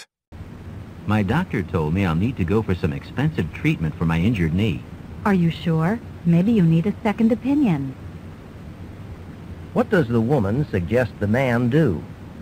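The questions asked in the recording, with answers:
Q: What does the woman suggest the man do?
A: Get a second opinion from another doctor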